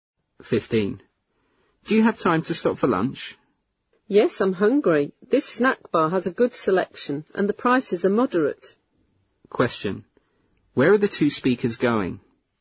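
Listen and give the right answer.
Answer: To a snack bar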